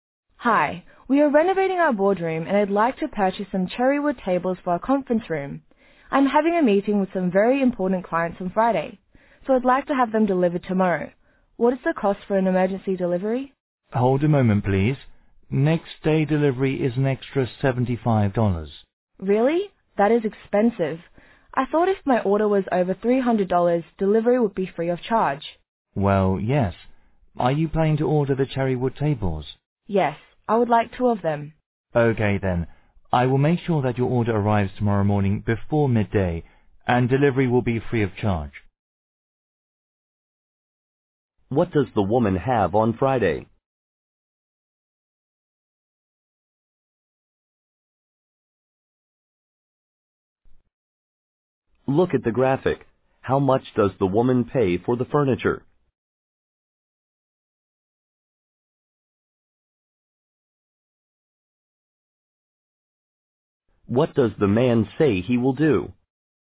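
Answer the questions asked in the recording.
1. A meeting with very important clients
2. Make sure her order arrives tomorrow morning before midday, with free delivery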